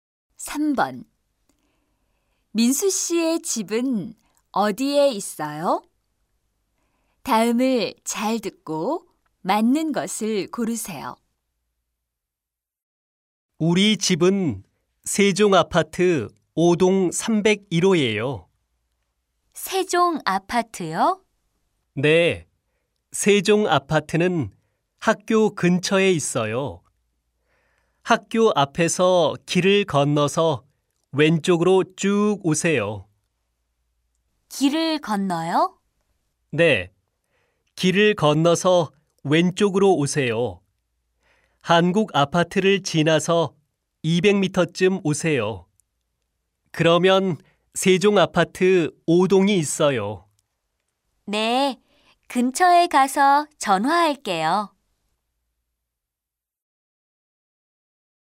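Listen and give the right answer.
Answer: 세종 아파트 5동 301호 (학교 근처, 길 건너 왼쪽, 한국 아파트 지나 200m)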